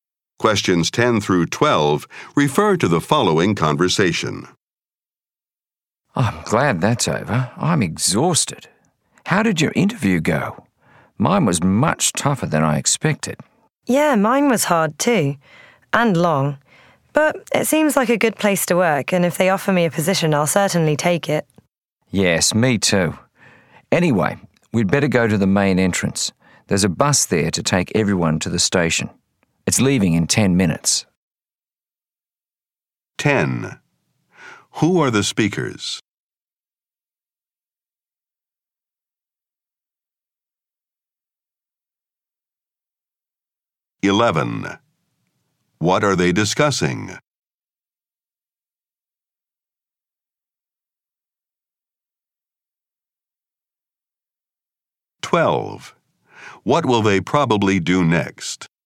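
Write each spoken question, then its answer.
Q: Who are the speakers?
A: Job applicants

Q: What are they discussing?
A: Their job interviews

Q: What will they probably do next?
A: Go to the main entrance to take the bus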